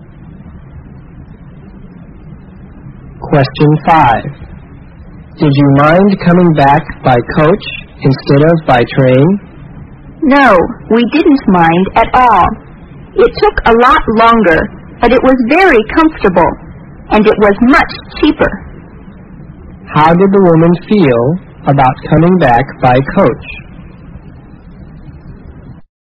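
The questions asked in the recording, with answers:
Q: How did the woman feel about coming back by coach?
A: She didn't mind; it was comfortable and cheaper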